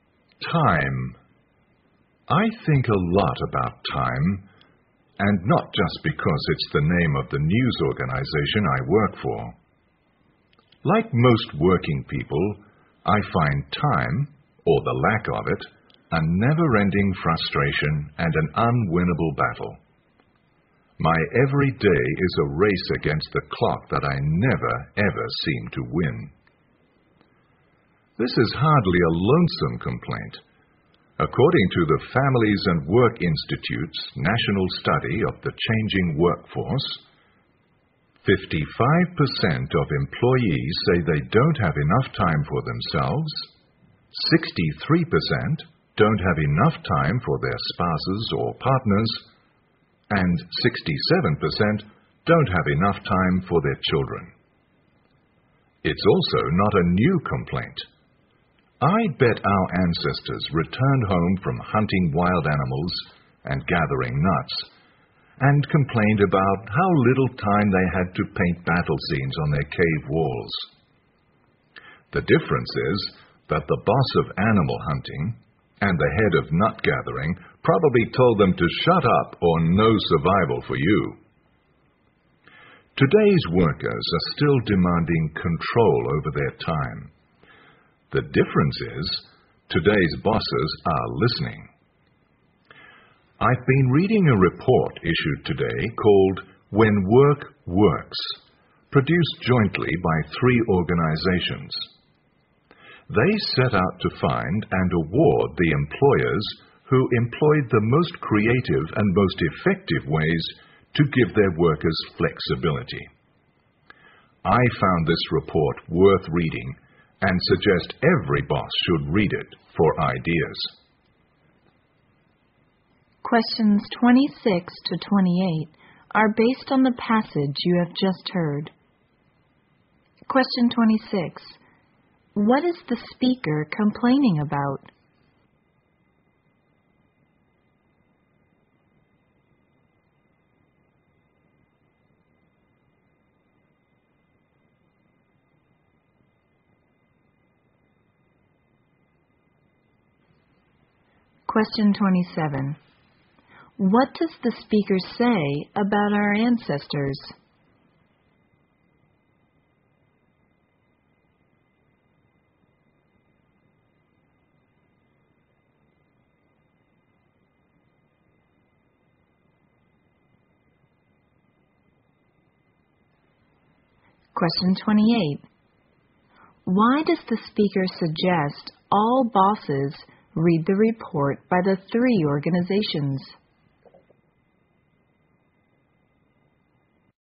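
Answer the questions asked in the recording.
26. Never having enough time
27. They probably also complained about not having enough time
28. To get ideas for giving workers flexibility over their time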